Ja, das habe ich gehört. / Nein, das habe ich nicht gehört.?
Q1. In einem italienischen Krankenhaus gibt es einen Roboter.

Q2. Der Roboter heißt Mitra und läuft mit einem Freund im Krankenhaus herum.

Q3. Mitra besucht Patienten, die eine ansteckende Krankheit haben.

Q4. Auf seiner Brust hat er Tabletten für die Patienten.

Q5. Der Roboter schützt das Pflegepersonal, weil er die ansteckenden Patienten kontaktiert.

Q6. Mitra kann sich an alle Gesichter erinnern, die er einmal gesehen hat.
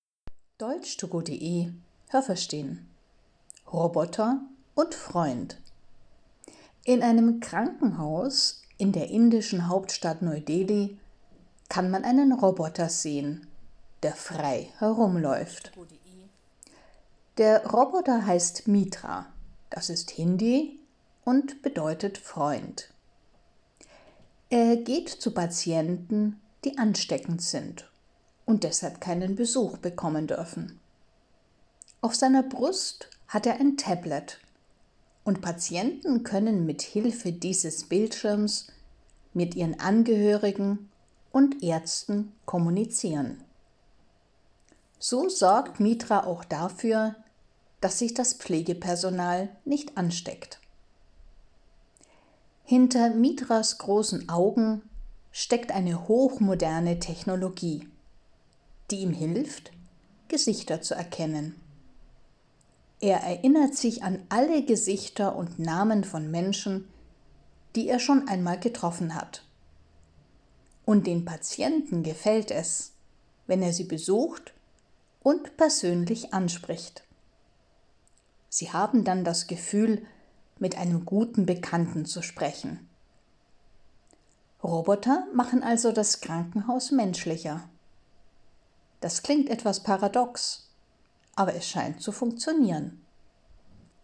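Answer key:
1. Nein, das habe ich nicht gehört.
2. Nein, das habe ich nicht gehört.
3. Ja, das habe ich gehört.
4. Nein, das habe ich nicht gehört.
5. Ja, das habe ich gehört.
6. Ja, das habe ich gehört.

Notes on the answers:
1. Der Roboter ist in einem indischen Krankenhaus.
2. Er läuft alleine herum. Sein Name Mitra bedeutet auf Deutsch „Freund".
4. Er hat auf seiner Brust ein Tablet, einen flachen Computer mit Bildschirm.

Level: A2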